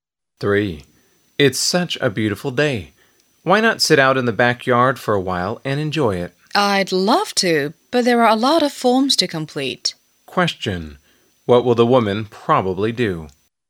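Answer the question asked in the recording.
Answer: Stay in and complete the forms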